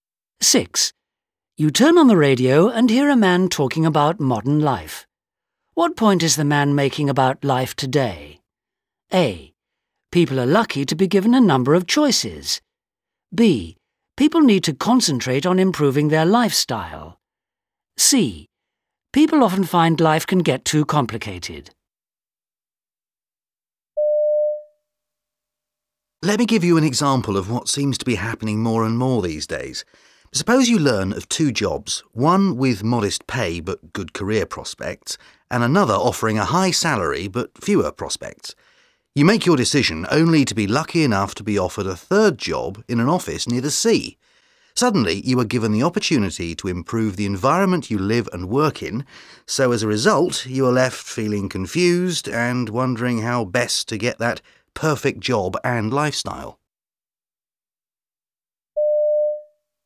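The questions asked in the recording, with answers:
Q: What point is the man making about life today?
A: C: People often find life can get too complicated.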